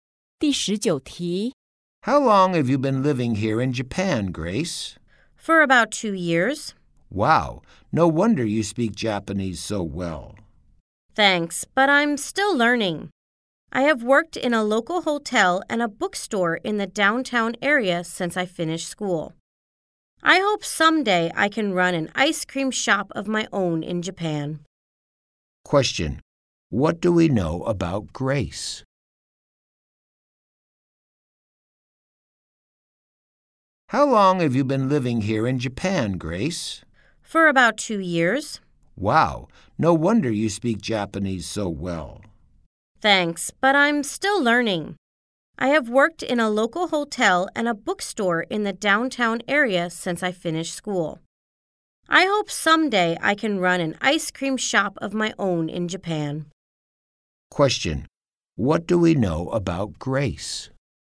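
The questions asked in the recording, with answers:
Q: What do we know about Grace?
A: She has lived in Japan for about 2 years and hopes to run her own ice cream shop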